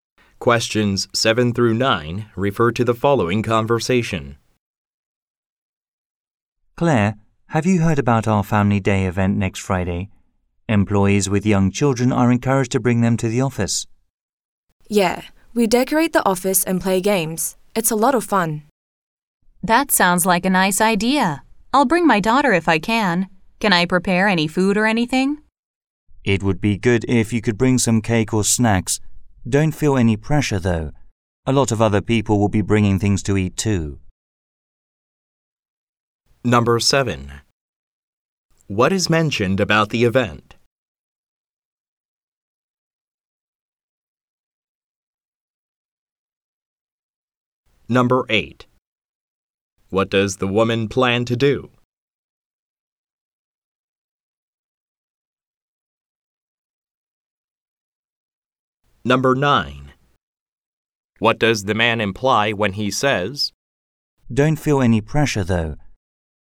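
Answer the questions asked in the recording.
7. Employees can bring their young children to the office.
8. Bring her daughter.
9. Bringing food is optional, since many others will bring food.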